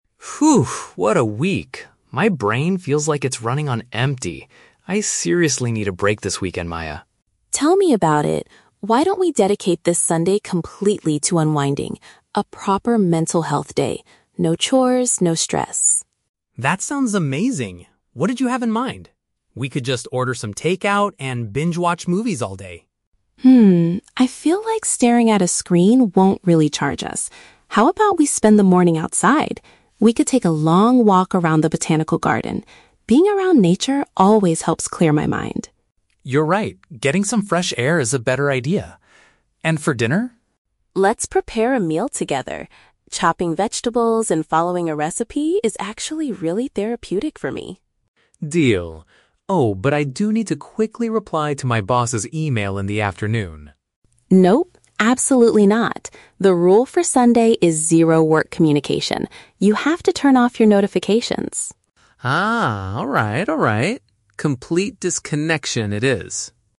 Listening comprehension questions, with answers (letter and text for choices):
Listen to a conversation between a couple planning their weekend. Choose the correct answer (A, B, or C) for each question.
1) Why does Maya reject the idea of watching movies all day?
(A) She wants to finish her household chores first.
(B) She believes looking at devices will not help them regain energy.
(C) She thinks they should save money instead of ordering takeout.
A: (B) She believes looking at devices will not help them regain energy.

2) How does Maya feel about cooking a meal at home?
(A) She finds the process calming and good for her mental state.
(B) She feels it is a faster option than waiting for food delivery.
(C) She thinks it is the only way to get Ryan to eat fresh vegetables.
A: (A) She finds the process calming and good for her mental state.

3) What strict rule does Maya set for Ryan on Sunday?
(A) He must reply to his manager before their morning walk.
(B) He is not allowed to use any recipes when making dinner.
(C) He must completely ignore his professional messages.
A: (C) He must completely ignore his professional messages.

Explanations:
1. The Key: Maya says "staring at a screen won't really recharge us". This is paraphrased in option B as "looking at devices will not help them regain energy". The Trap (A): The word "chores" is mentioned in the audio, but Maya explicitly says they will have a day with "no chores" (mentioned but rejected). The Trap (C): Saving money is a logical reason to not order takeout, but it is never mentioned in the conversation (plausible but not mentioned).
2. The Key: Maya describes chopping vegetables and cooking as "really therapeutic". "Therapeutic" means having a good, calming effect on the mind, which matches option A. The Trap (C): The word "vegetables" is mentioned, but Maya chops them because she enjoys it, not to force Ryan to eat them (mentioned but wrong context). The Trap (B): Food delivery (takeout) is mentioned earlier, but speed is not the reason she wants to cook (plausible but not mentioned).
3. The Key: Maya says the rule is "zero work communication" and tells Ryan to "turn off your notifications". This means he must ignore his professional messages. The Trap (A): Ryan wants to reply to his boss's email in the afternoon, but Maya strictly forbids it. Option A says he must reply, which is the exact opposite of the rule. The Trap (B): Maya mentions "following a recipe" as part of the fun, so she definitely allows using recipes (mentioned but wrong context).

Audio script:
Ryan: Phew, what a week. My brain feels like it's running on empty. I seriously need a break this weekend, Maya.
Maya: Tell me about it. Why don't we dedicate this Sunday completely to unwinding? A proper mental health day. No chores, no stress.
Ryan: That sounds amazing. What did you have in mind? We could just order some takeout and binge-watch movies all day.
Maya: Hmm, I feel like staring at a screen won't really recharge us. How about we spend the morning outside? We could take a long walk around the botanical garden. Being around nature always helps clear my mind.
Ryan: You're right, getting some fresh air is a better idea. And for dinner?
Maya: Let's prepare a meal together. Chopping vegetables and following a recipe is actually really therapeutic for me.
Ryan: Deal. Oh, but I do need to quickly reply to my boss's email in the afternoon...
Maya: Nope, absolutely not! The rule for Sunday is zero work communication. You have to turn off your notifications.